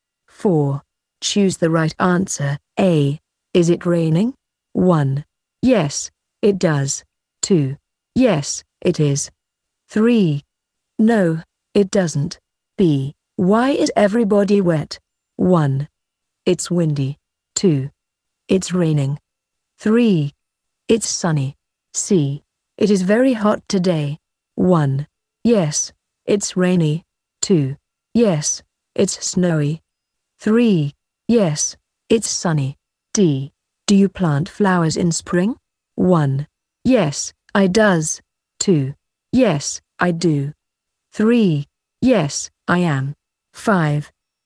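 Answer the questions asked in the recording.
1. 2: Yes, it is.
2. 2: It's raining.
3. 3: Yes, it's sunny.
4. 2: Yes, I do.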